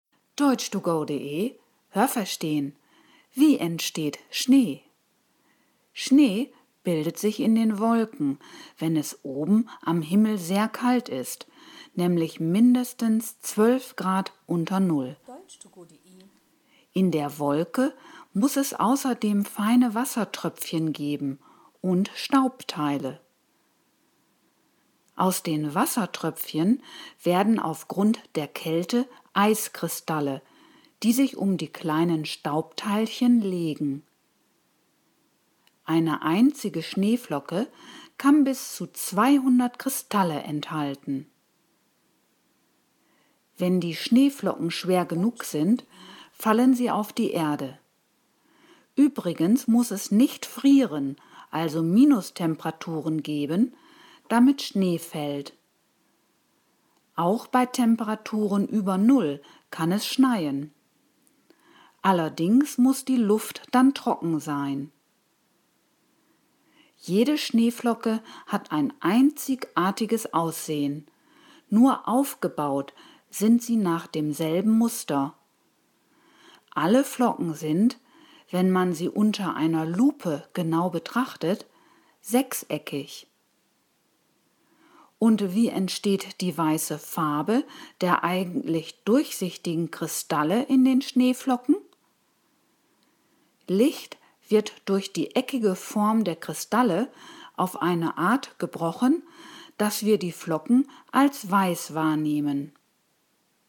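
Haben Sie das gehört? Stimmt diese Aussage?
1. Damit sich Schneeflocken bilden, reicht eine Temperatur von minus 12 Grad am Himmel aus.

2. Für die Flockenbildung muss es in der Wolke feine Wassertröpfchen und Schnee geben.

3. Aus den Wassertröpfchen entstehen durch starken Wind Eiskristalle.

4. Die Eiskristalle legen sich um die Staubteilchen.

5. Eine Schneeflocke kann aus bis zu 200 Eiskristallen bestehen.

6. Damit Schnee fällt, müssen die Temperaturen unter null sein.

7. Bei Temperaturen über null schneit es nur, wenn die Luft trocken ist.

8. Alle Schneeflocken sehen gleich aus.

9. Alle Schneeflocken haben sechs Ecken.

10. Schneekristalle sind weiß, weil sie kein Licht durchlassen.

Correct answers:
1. richtig
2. falsch
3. falsch
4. richtig
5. richtig
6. falsch
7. richtig
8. falsch
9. richtig
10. falsch

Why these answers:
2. Es muss Wassertröpfchen und Staubteile geben.
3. Die Eiskristalle entstehen durch die Kälte.
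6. Es muss nicht frieren, also keine Minustemperaturen geben.
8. Sie sind einzigartig in ihrem Aussehen, sind aber nach demselben Muster aufgebaut.
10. Das Licht wird in den Kristallen auf eine Art gebrochen, dass wir die Flocken als weiß wahrnehmen.

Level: B (mittel)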